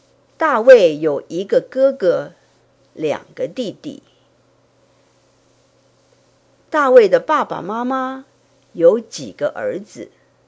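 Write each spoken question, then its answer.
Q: 大卫的爸爸妈妈有几个儿子?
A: 四个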